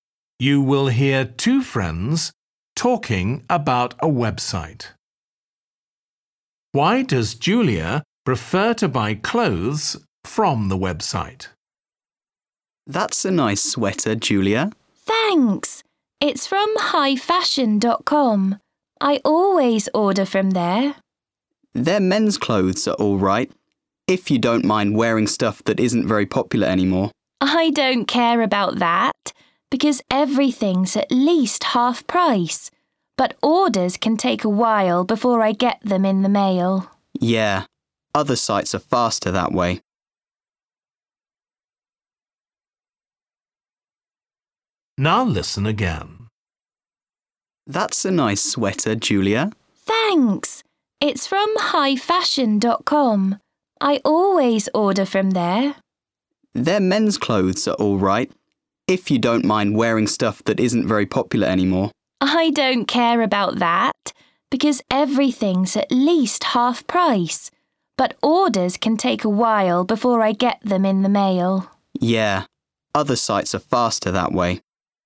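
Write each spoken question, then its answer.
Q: Why does Julia prefer to buy clothes from the website?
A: Everything is at least half price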